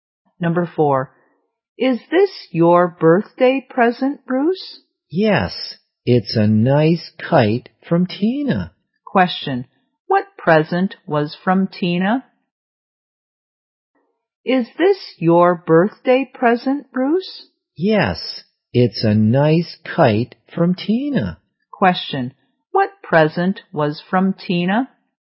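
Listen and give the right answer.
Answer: A kite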